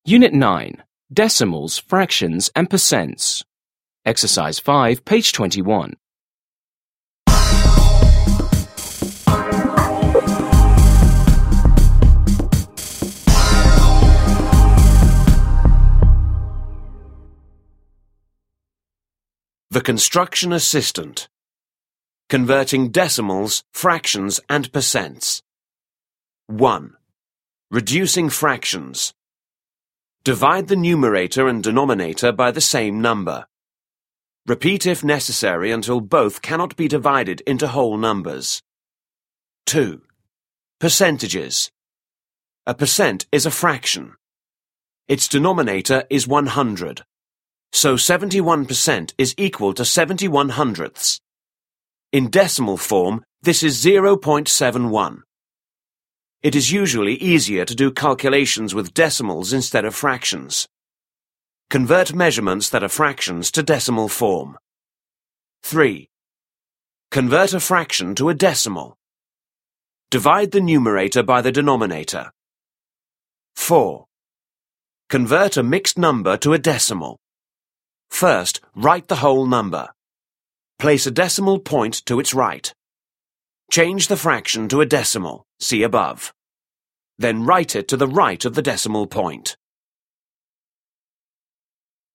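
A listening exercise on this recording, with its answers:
5. Listen and read the guide about converting fractions, decimals, and percents again. How do you convert a fraction into a decimal?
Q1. How do you convert a fraction into a decimal?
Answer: Divide the numerator by the denominator.

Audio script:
Unit 9. Decimals, fractions, and percents.
The Construction Assistant:
Converting Decimals, Fractions, and Percents
1. Reducing Fractions: Divide the numerator and denominator by the same number. Repeat if necessary until both cannot be divided into whole numbers.
2. Percentages: A percent is a fraction. Its denominator is 100. So 71% is equal to 71/100. In decimal form, this is 0.71. It is usually easier to do calculations with decimals instead of fractions. Convert measurements that are fractions to decimal form.
3. Convert a fraction to a decimal: Divide the numerator by the denominator.
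4. Convert a mixed number to a decimal: First, write the whole number. Place a decimal point to its right. Change the fraction to a decimal (see above). Then write it to the right of the decimal point.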